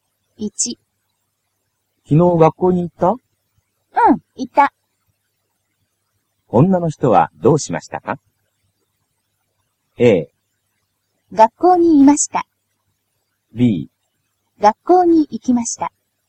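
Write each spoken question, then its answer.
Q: 女の人はどうしましたか?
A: B: 学校に行きました。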